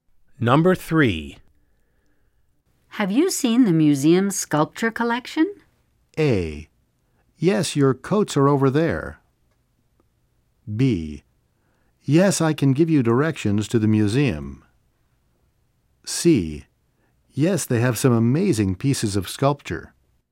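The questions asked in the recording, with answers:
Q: Have you seen the museum's sculpture collection?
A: C: Yes, they have some amazing pieces of sculpture.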